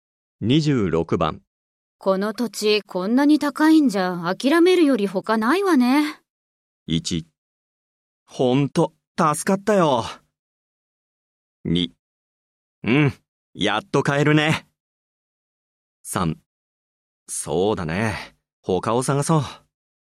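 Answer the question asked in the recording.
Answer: 3: そうだね、他を探そう。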